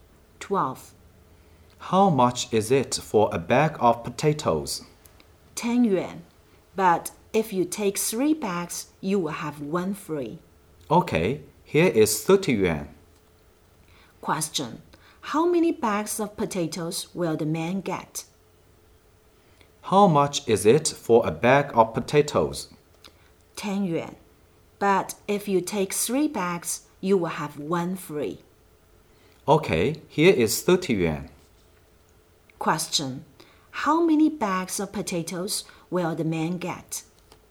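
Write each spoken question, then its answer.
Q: How many bags of potatoes will the man get?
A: Four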